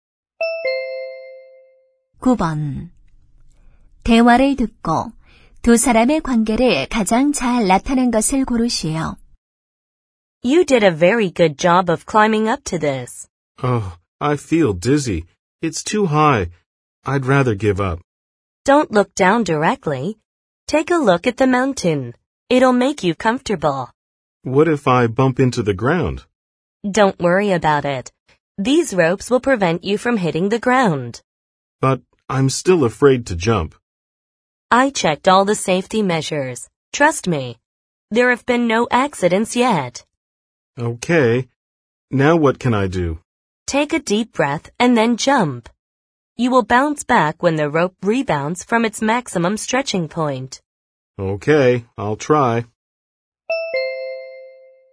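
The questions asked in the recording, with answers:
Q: 대화를 듣고 두 사람의 관계를 가장 잘 나타낸 것을 고르시오.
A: 번지점프 강사와 손님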